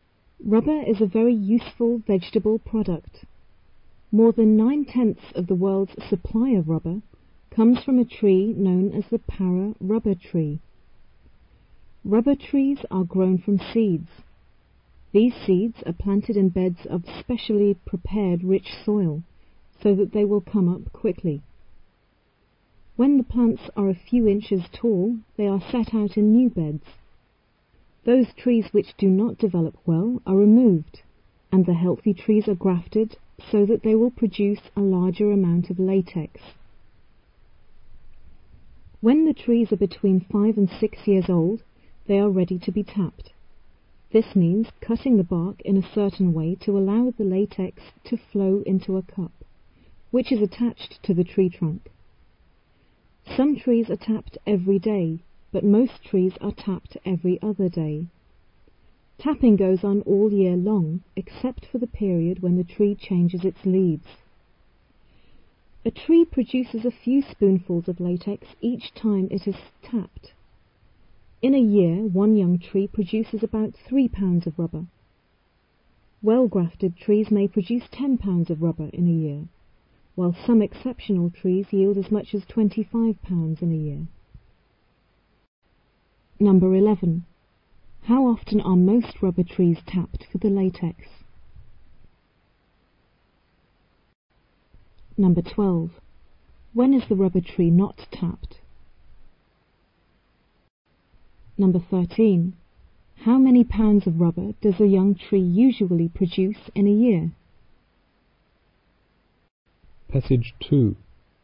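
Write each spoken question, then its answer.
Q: How often are most rubber trees tapped for the latex?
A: Every other day

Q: When is the rubber tree not tapped?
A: When it is changing its leaves

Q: How many pounds of rubber does a young tree usually produce in a year?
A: About 3 pounds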